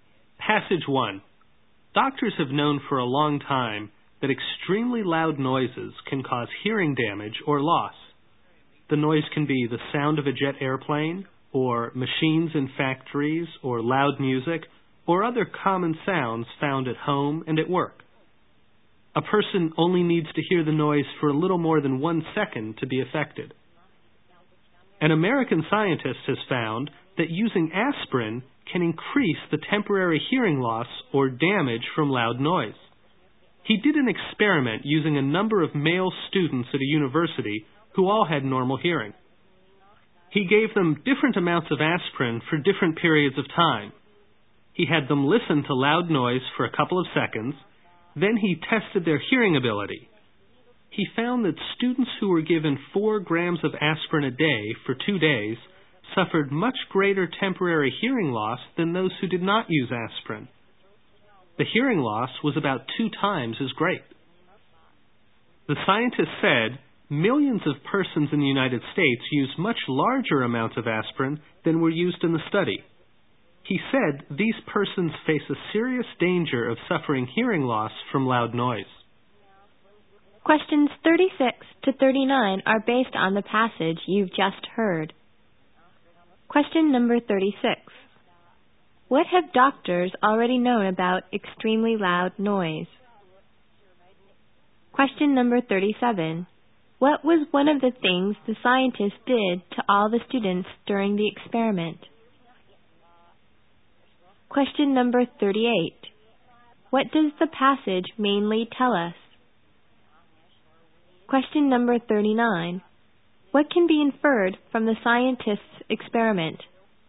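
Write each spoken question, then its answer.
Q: What have doctors already known about extremely loud noise?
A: It can cause hearing damage or loss

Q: What was one of the things the scientists did to all the students during the experiment?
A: Had them listen to loud noise and tested their hearing

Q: What does the passage mainly tell us?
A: Aspirin can increase hearing loss from loud noise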